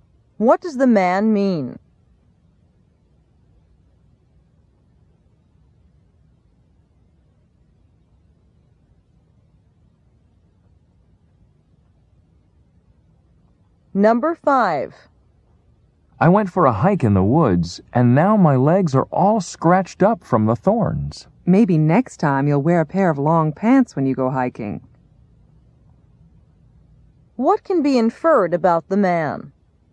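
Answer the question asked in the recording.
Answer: He wore short pants when he went hiking.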